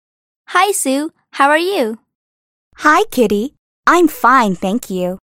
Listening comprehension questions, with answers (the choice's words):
«باتوجه به فایل صوتی جملات را به ترتیب بنویسید»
How's Sue?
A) She's bad.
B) She's sick.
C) She's fine.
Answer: She's fine.